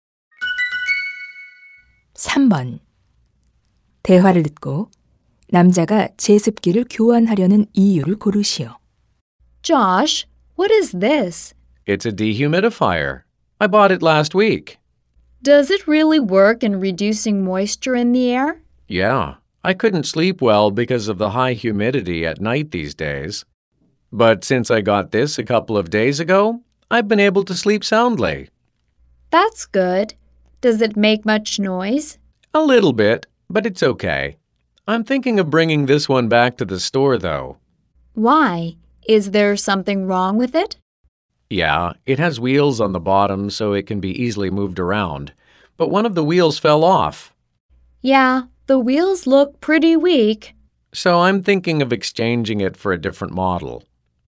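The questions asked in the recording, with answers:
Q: 대화를 듣고 남자가 제습기를 교환하려는 이유를 고르시오.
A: 바퀴 하나가 떨어져서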